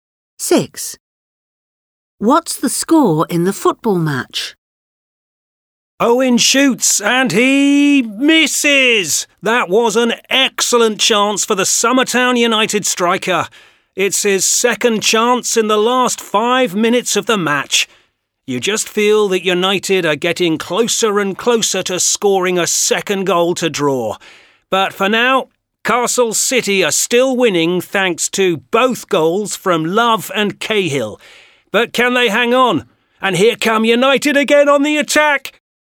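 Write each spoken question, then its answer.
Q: What's the score in the football match?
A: 2-1 to Castle City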